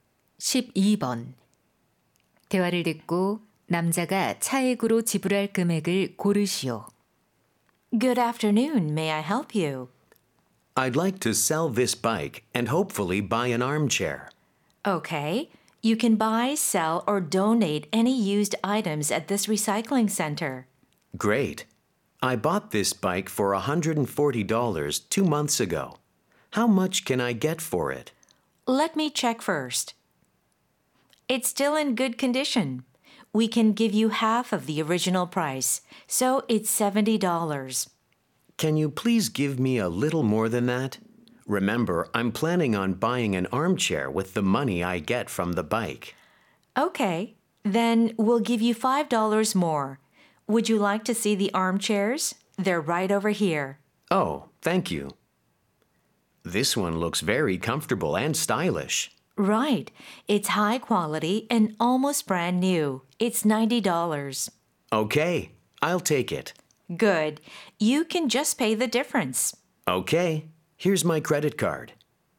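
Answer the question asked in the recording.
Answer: 15달러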